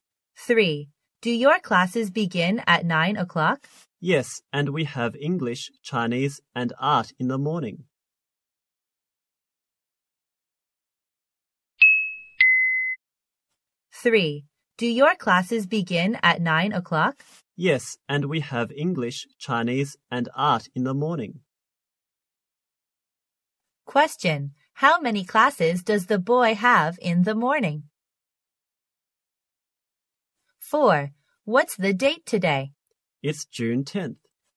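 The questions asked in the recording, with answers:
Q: How many classes does the boy have in the morning?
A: Three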